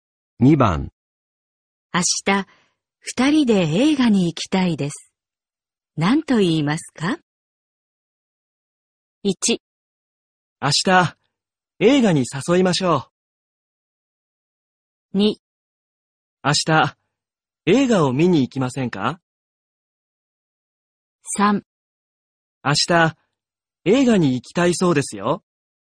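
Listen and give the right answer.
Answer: 2: 明日、映画を見に行きませんか?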